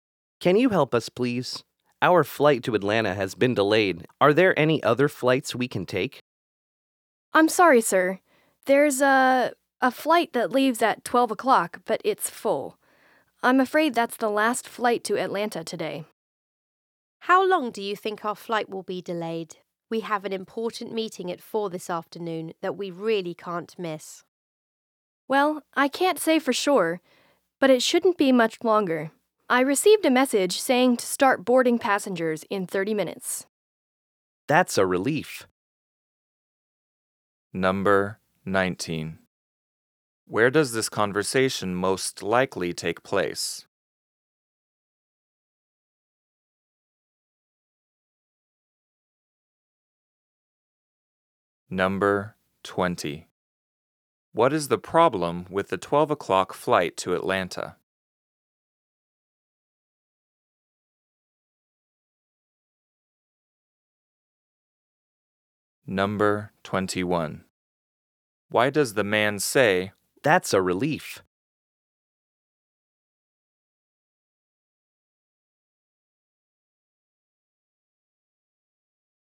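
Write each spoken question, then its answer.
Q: Where does this conversation most likely take place?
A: At an airport

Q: What is the problem with the 12 o'clock flight to Atlanta?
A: It is full

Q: Why does the man say, "That's a relief"?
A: Boarding starts in 30 minutes, so they won't miss their meeting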